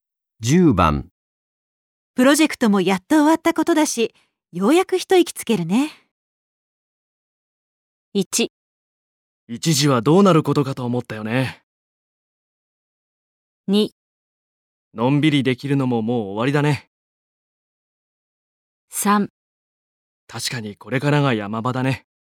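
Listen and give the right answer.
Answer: 1: 一時はどうなることかと思ったよね。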